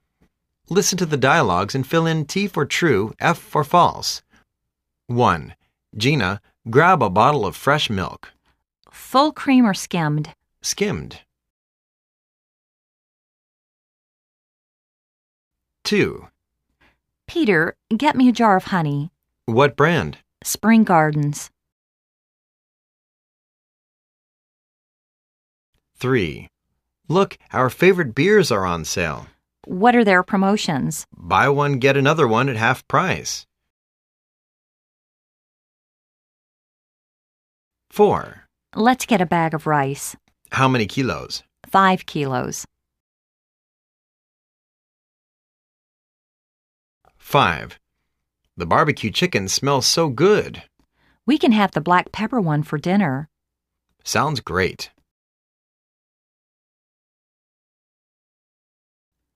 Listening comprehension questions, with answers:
Listen to the dialogues and fill in T for "True", F for "False".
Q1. They are buying skimmed milk.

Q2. They don't like the honey from Spring Gardens.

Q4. They want a pack of 3 kilos rice.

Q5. They are going to buy a honey chicken for dinner.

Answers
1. T
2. F
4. F
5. F